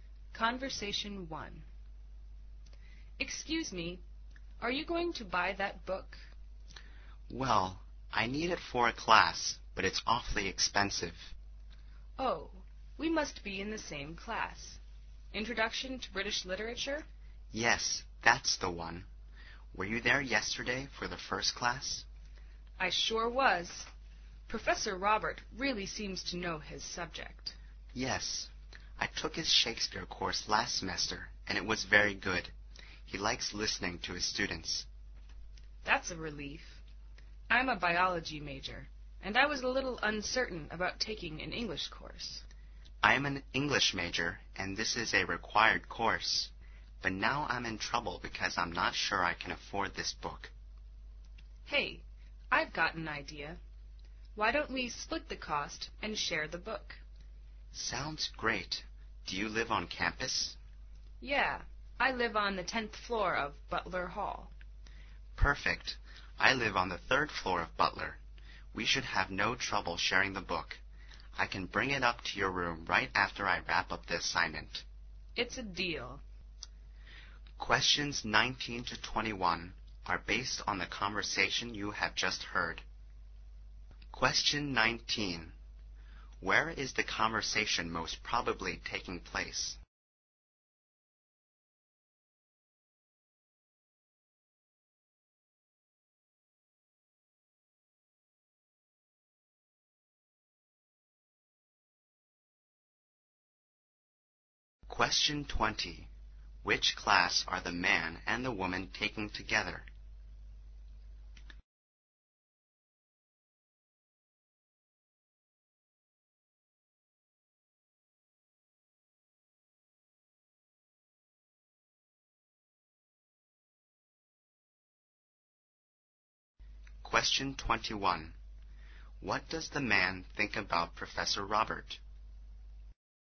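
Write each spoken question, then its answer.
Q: Where is the conversation most probably taking place?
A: In a bookstore

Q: Which class are the man and the woman taking together?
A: Introduction to British Literature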